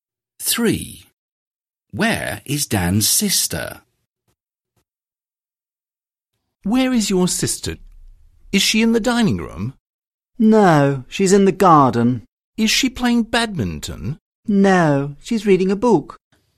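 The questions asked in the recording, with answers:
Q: Where is Dan's sister?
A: in the garden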